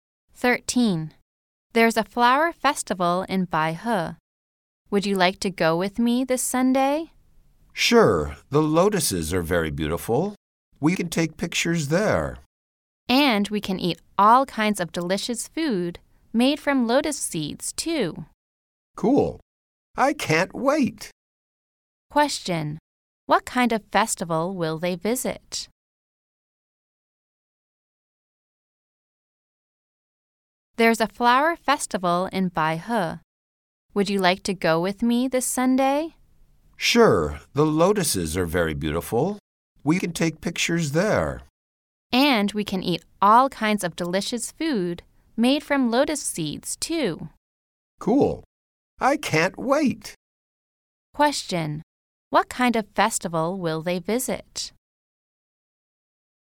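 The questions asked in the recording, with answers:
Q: Question.What kind of festival will they visit?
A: A lotus flower festival in Baihe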